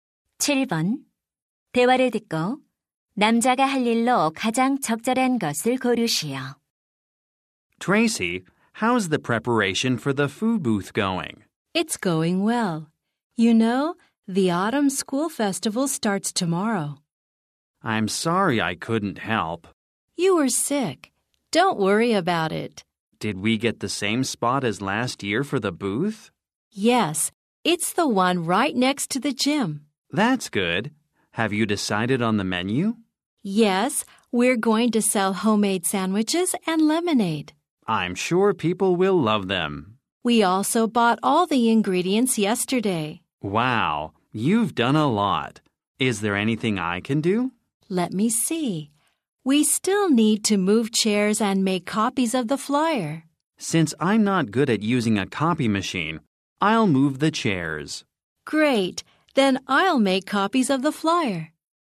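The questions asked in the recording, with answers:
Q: 대화를 듣고 남자가 할 일로 가장 적절한 것을 고르시오.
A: 의자 옮기기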